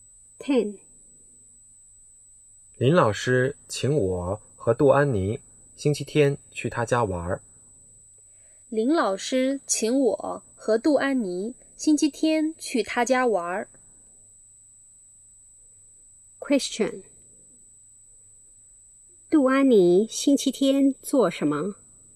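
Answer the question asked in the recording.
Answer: 去林老师家玩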